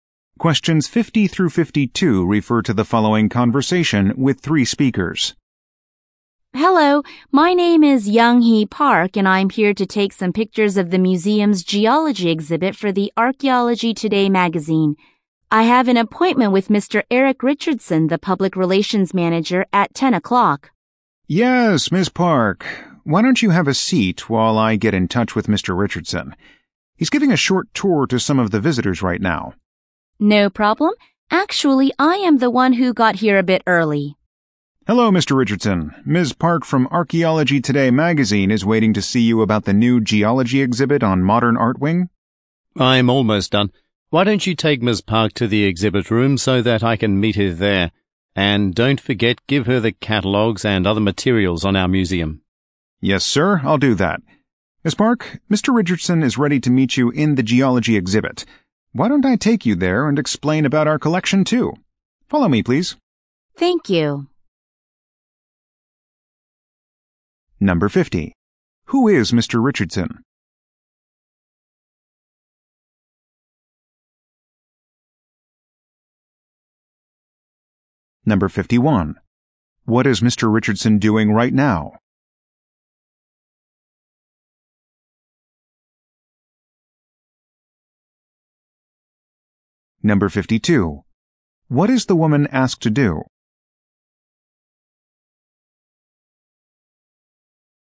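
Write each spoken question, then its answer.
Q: Who is Mr. Richardson?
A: The museum's public relations manager

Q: What is Mr. Richardson doing right now?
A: Giving a short tour to visitors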